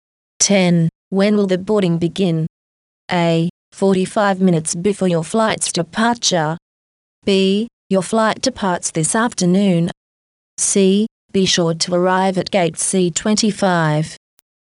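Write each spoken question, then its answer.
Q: When will the boarding begin?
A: A: 45 minutes before your flight's departure.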